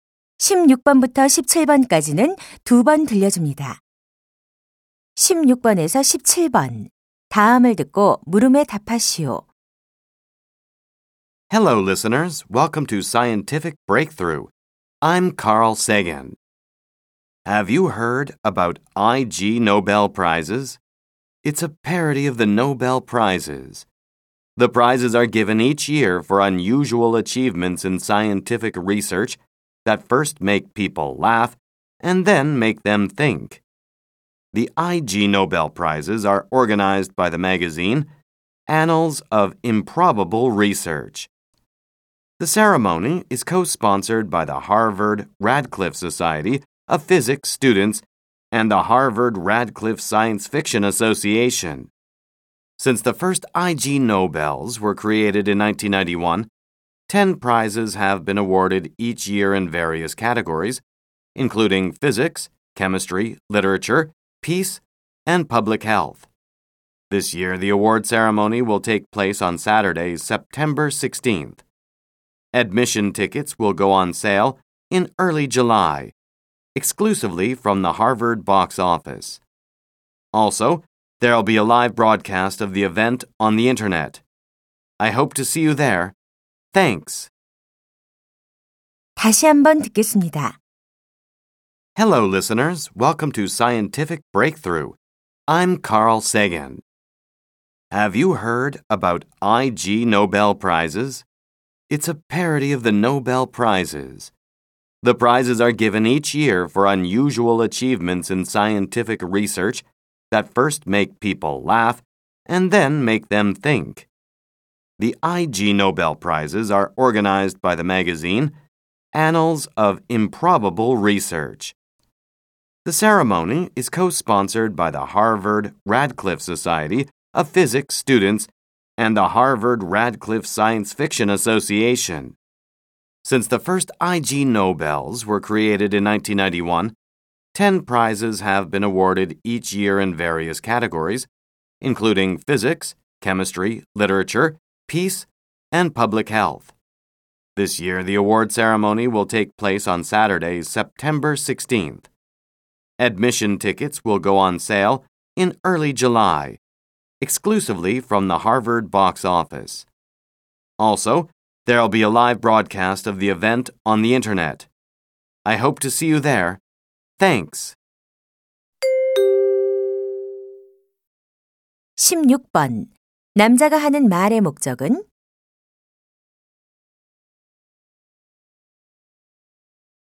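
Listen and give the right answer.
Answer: 이그 노벨상 소개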